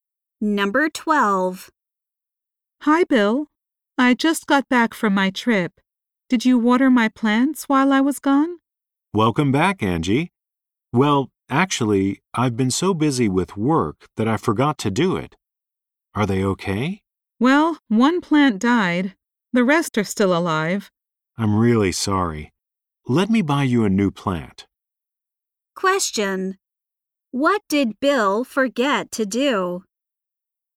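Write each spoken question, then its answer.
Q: What did Bill forget to do?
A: Water Angie's plants.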